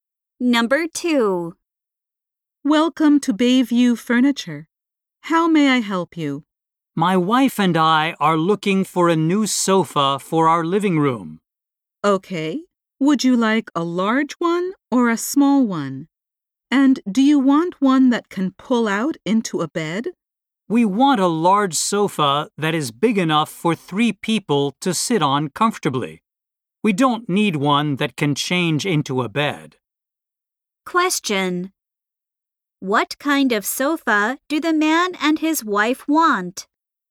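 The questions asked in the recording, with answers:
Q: What kind of sofa do the man and his wife want?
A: A large sofa for 3 people that doesn't turn into a bed.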